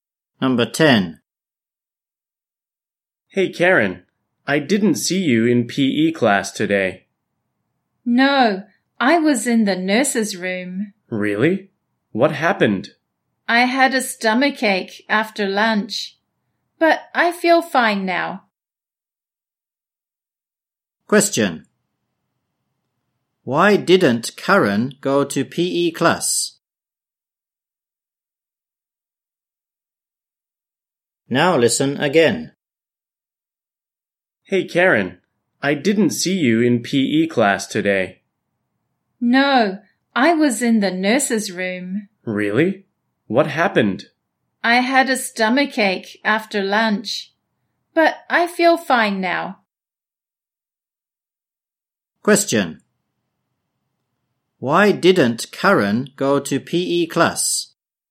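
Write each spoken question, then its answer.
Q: Why didn't Karen go to PE class?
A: She had a stomachache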